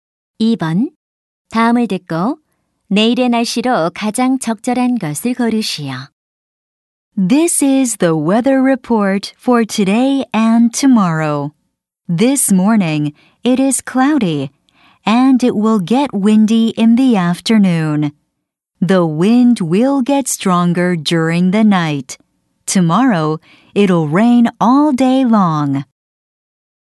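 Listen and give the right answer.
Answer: 하루 종일 비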